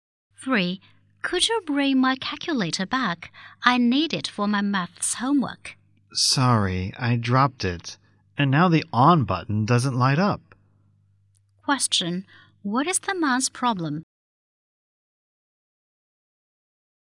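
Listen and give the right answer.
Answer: He broke the woman's calculator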